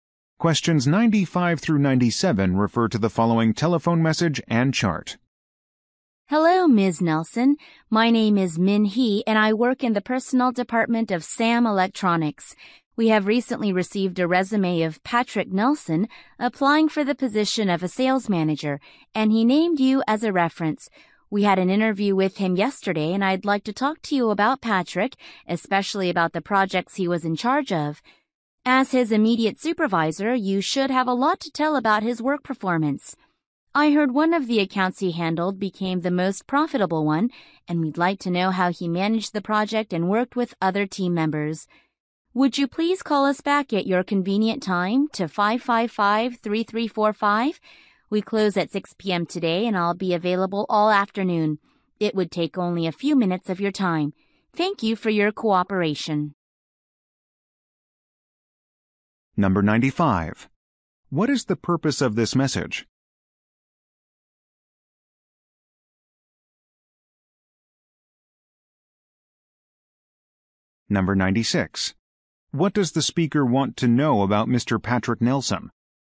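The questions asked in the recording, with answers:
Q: What is the purpose of this message?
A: To get a reference for Patrick Nelson

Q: What does the speaker want to know about Mr.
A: How he managed his projects and worked with team members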